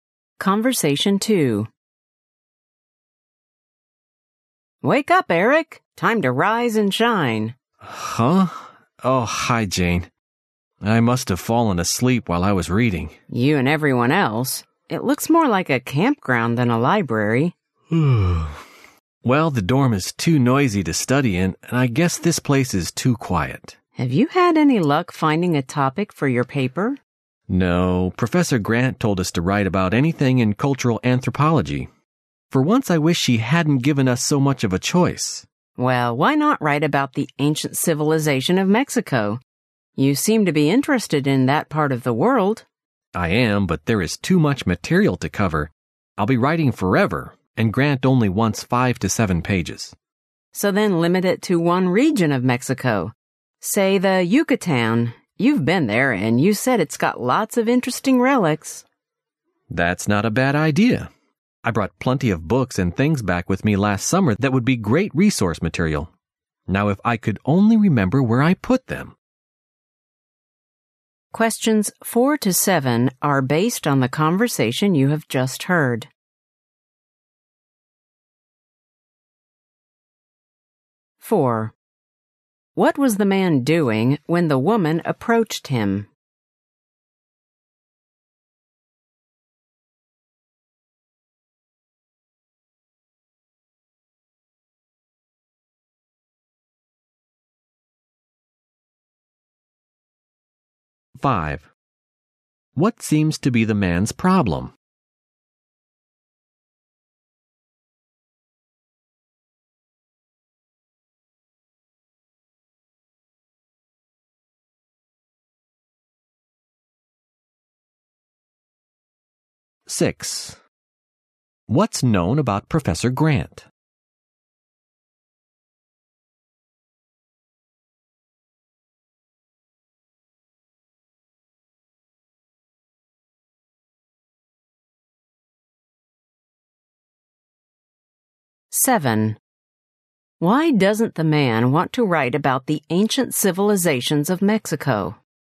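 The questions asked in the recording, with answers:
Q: What was the man doing when the woman approached him?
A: Sleeping in the library

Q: What seems to be the man's problem?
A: He can't find a topic for his paper

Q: What's known about Professor Grant?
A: She lets students write about anything in cultural anthropology

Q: Why doesn't the man want to write about the ancient civilizations of Mexico?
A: There is too much material to cover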